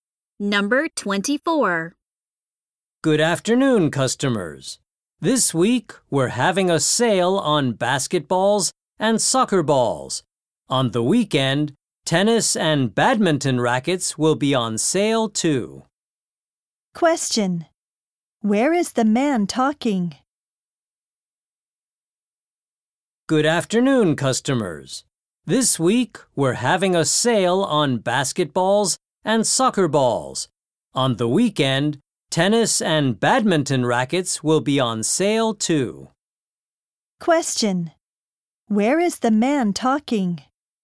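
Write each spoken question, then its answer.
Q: Where is the man talking?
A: At a sports store.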